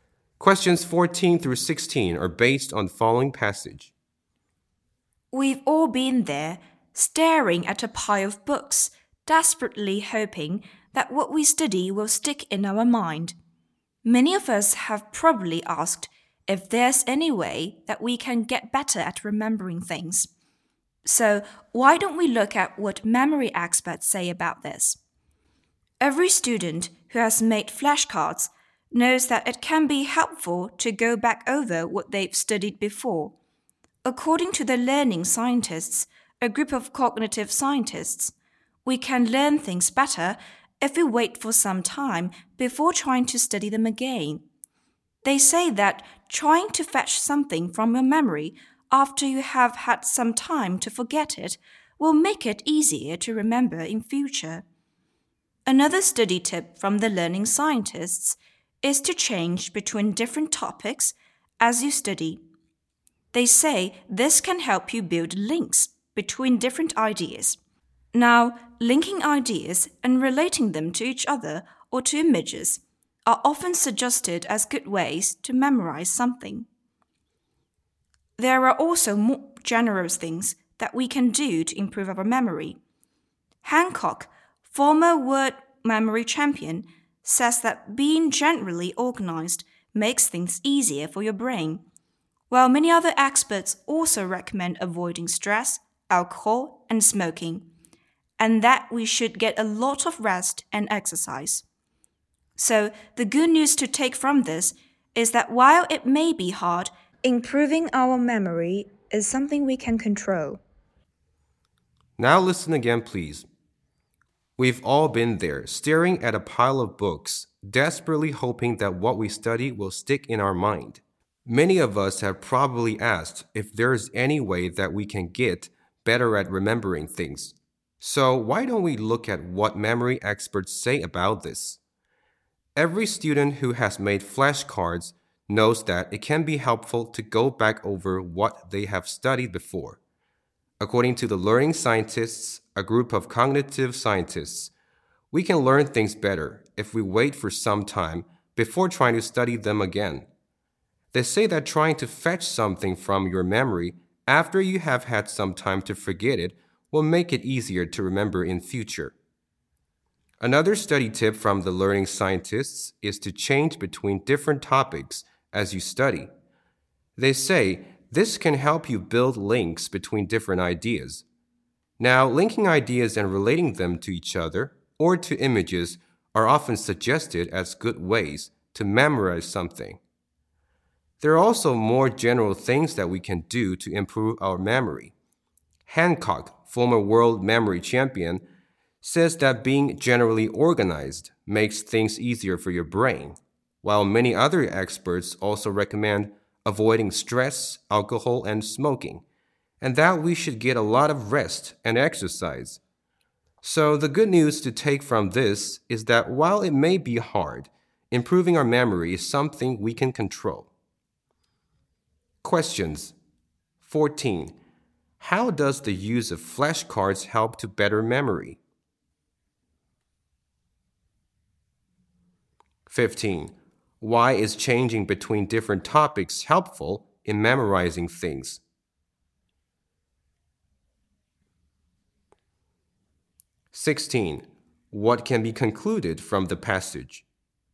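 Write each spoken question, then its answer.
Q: How does the use of flashcards help to better memory?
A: By going back over what you studied after some time

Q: Why is changing between different topics helpful in memorizing things?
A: It helps build links between different ideas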